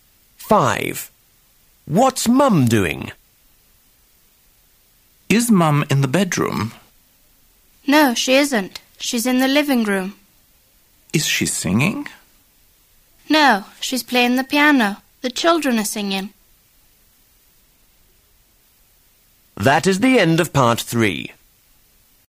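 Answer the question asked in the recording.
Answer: Playing the piano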